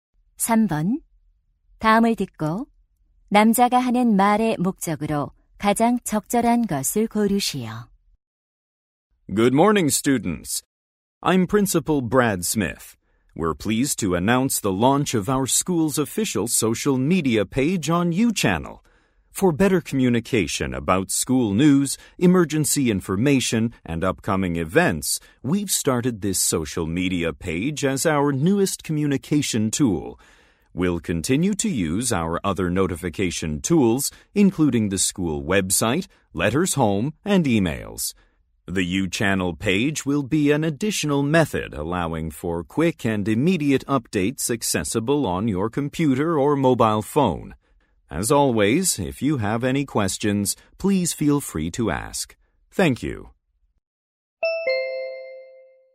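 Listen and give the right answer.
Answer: 학교 공식 소셜 미디어(YouChannel) 페이지 개설을 알리려고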